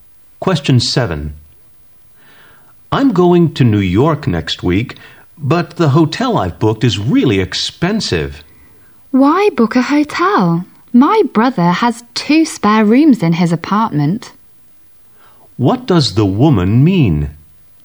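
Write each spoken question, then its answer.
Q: What does the woman mean?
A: The man can stay at her brother's apartment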